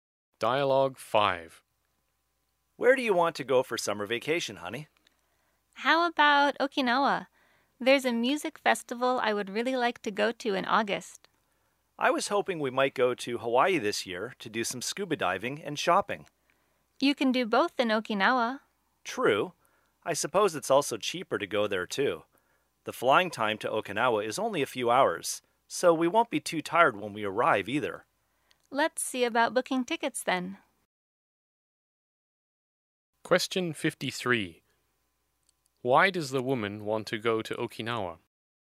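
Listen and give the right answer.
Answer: To go to a music festival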